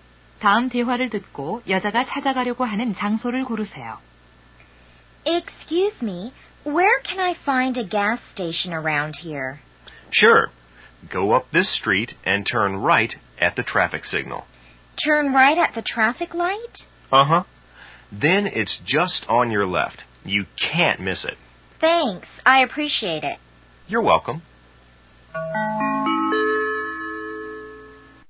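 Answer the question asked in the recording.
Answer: 주유소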